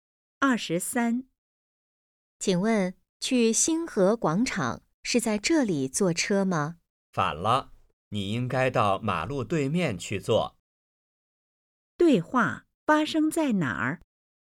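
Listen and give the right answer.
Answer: 车站(马路边)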